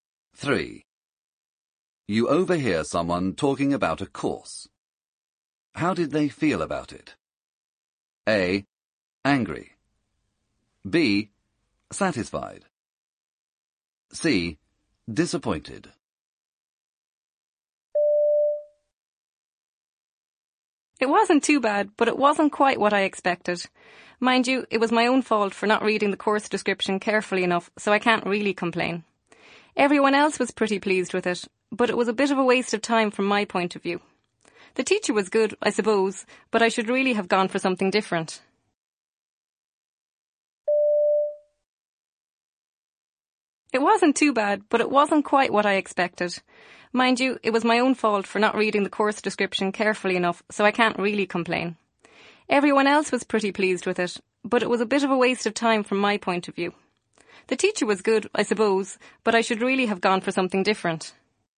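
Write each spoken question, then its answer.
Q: How did they feel about it?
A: C: Disappointed.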